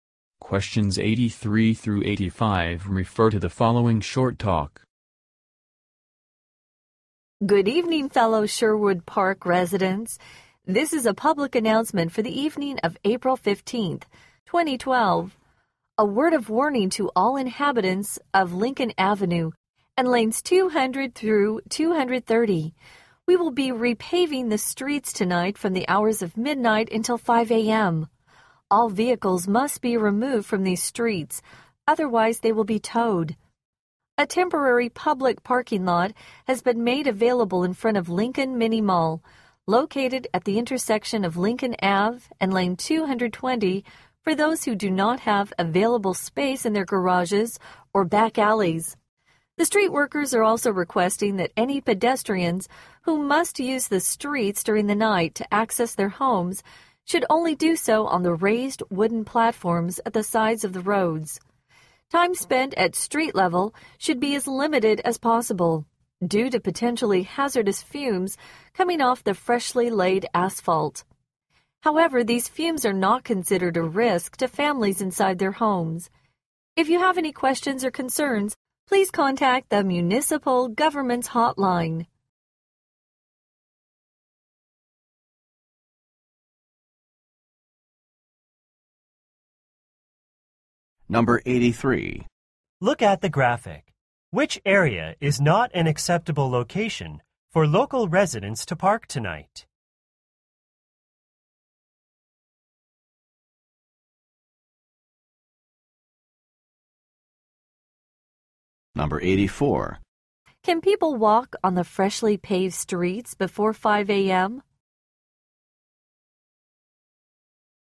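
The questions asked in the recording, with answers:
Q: Can people walk on the freshly paved streets before 5 a.m.?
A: No, only on the raised wooden platforms at the sides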